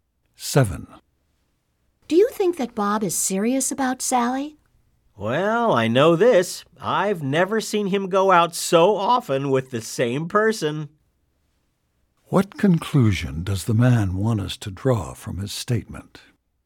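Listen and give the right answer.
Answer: Bob is serious about Sally.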